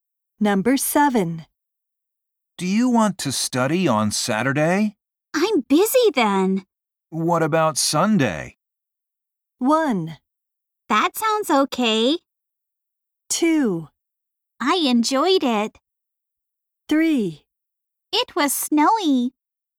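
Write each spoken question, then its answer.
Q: What about Sunday?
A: 1: That sounds okay.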